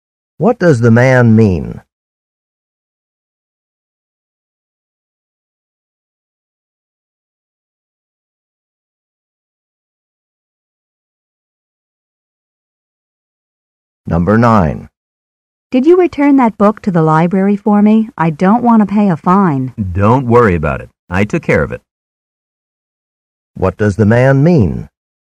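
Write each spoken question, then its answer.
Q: What does the man mean?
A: He has already returned the book.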